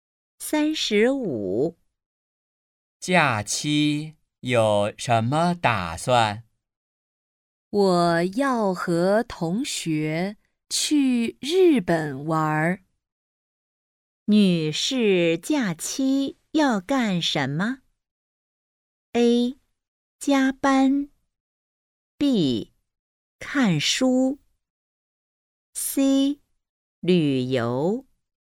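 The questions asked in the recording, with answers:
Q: 女士假期要干什么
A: C: 旅游。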